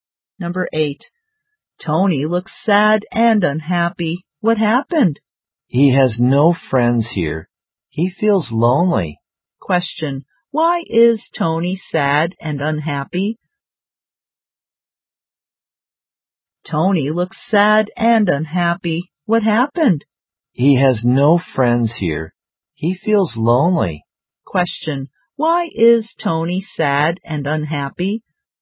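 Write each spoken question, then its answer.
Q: Question, why is Tony sad and unhappy?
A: He has no friends there and feels lonely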